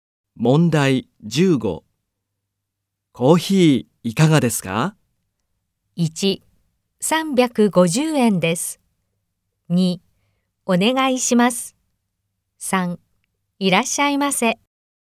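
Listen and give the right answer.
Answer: 2: お願いします。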